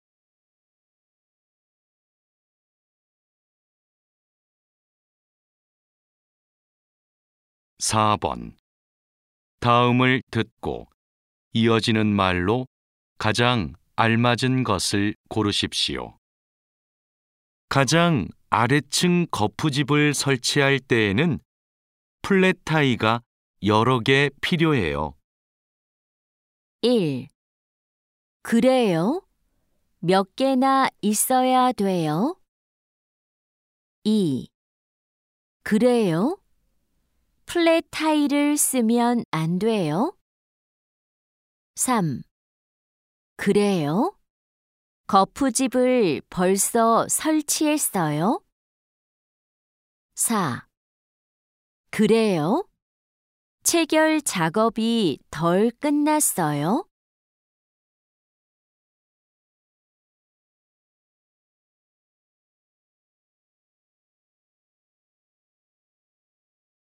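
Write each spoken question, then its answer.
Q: 가장 아래층 거푸집을 설치할 때에는 플랫타이가 여러 개 필요해요.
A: 1: 그래요? 몇 개나 있어야 돼요?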